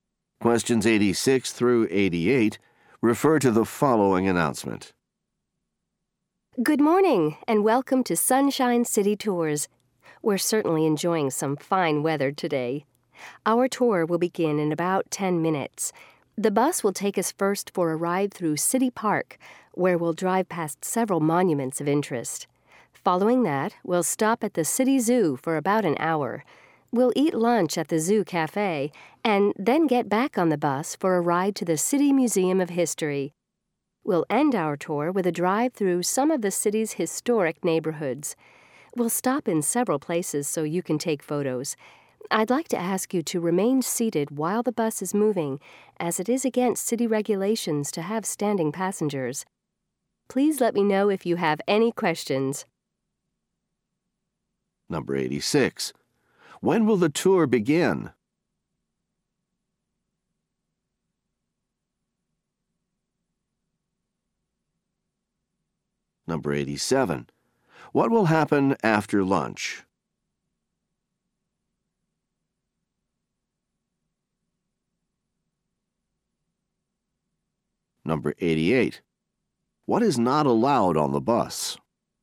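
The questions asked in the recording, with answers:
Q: When will the tour begin?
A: In about 10 minutes

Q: What will happen after lunch?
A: They will ride the bus to the City Museum of History

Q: What is not allowed on the bus?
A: Standing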